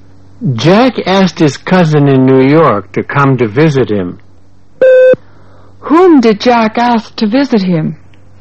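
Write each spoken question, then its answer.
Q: Whom did Jack ask to visit him?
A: His cousin in New York.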